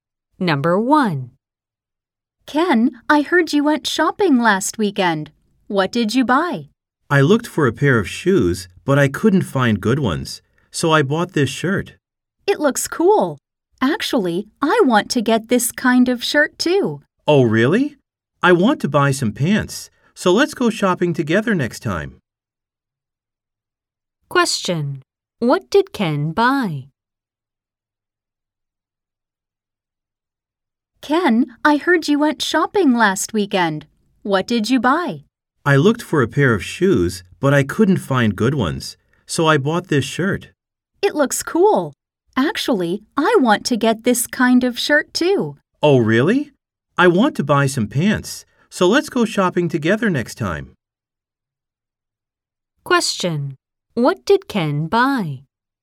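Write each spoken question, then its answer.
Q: What did Ken buy?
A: A shirt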